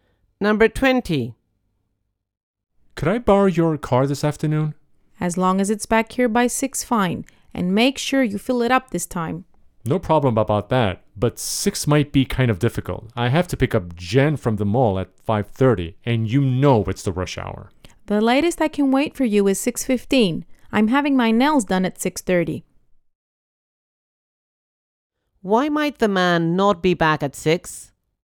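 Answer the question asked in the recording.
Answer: He has to pick up Jen at the mall at 5:30, during rush hour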